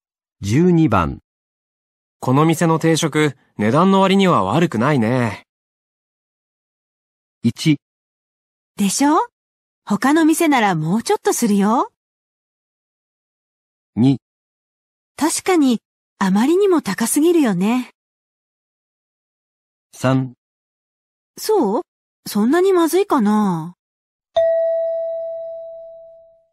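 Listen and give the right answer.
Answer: 1: でしょ?他の店ならもうちょっとするよ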